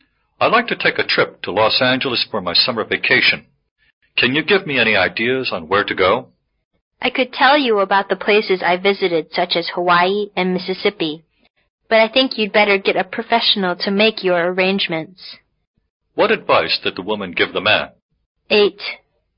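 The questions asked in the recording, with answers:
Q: What advice did the woman give the man?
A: Get a professional to make his travel arrangements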